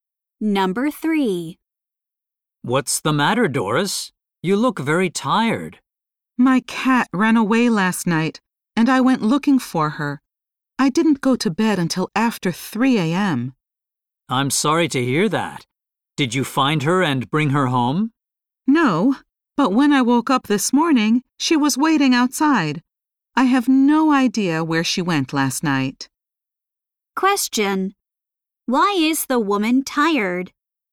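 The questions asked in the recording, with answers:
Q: Why is the woman tired?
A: She stayed up late looking for her cat.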